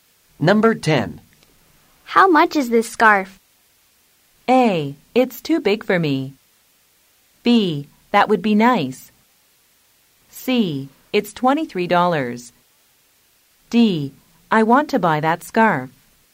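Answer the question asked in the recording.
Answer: C: It's $23.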